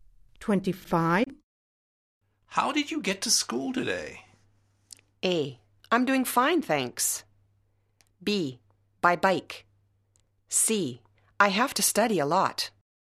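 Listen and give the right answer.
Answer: B: By bike.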